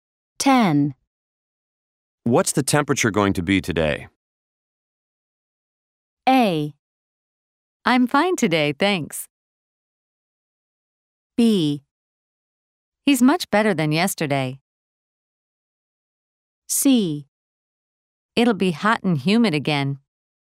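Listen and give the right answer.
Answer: C: It'll be hot and humid again.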